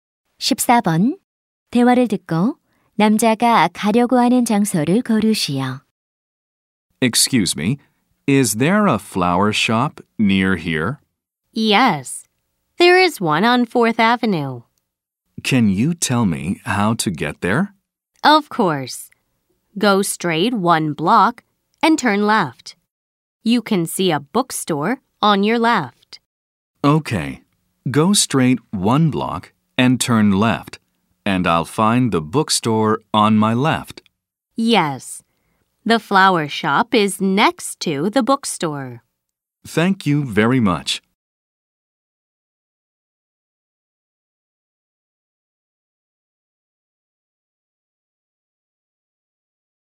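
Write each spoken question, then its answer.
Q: 대화를 듣고 남자가 가려고 하는 장소를 고르시오.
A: 꽃집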